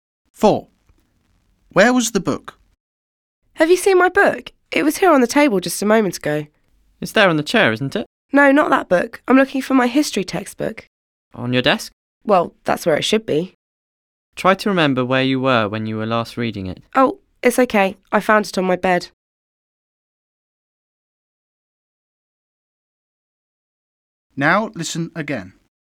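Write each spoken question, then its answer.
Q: Where was the book?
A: On the bed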